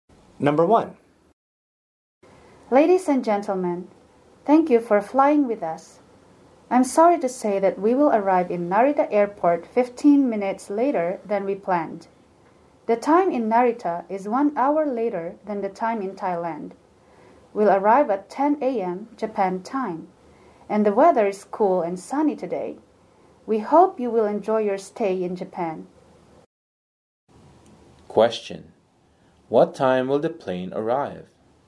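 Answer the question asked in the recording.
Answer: At 10 a.m. Japan time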